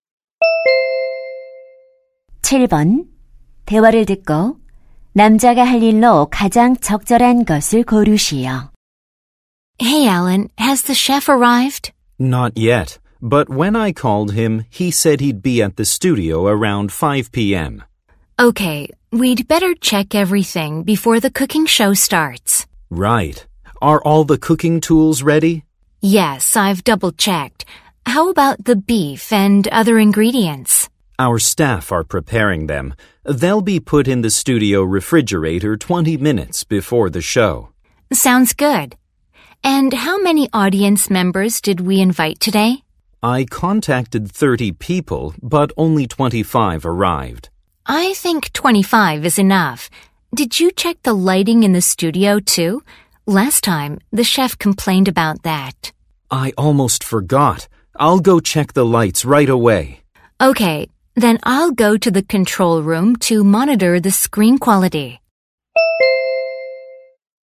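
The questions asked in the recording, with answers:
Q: 대화를 듣고 남자가 할 일로 가장 적절한 것을 고르시오.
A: 스튜디오 조명 점검하기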